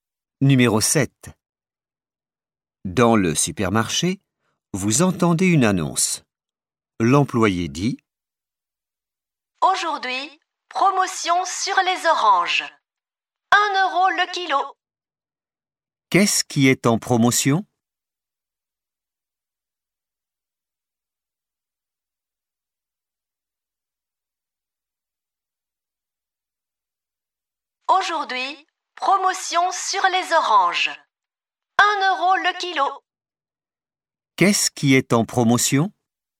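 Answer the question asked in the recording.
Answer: Les oranges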